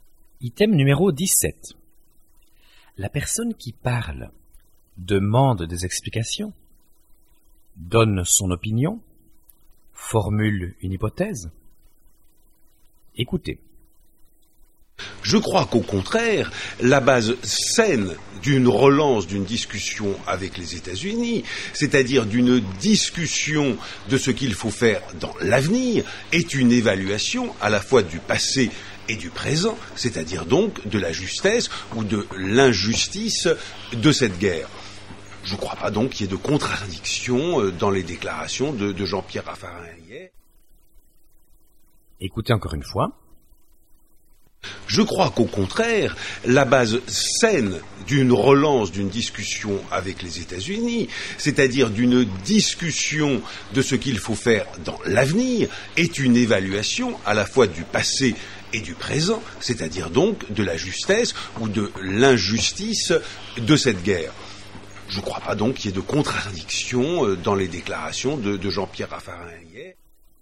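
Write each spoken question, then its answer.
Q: La personne qui parle demande des explications, donne son opinion, formule une hypothèse.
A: donne son opinion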